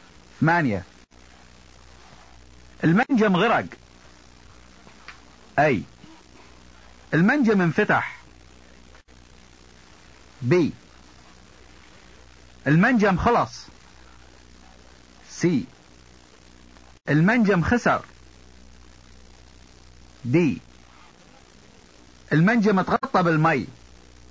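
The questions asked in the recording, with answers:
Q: المنجم غرق.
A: D: المنجم اتغطى بالماء.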